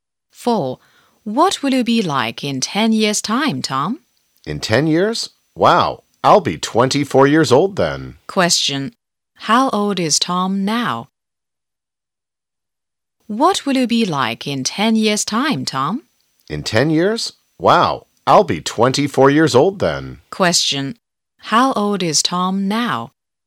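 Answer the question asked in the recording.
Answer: 14 years old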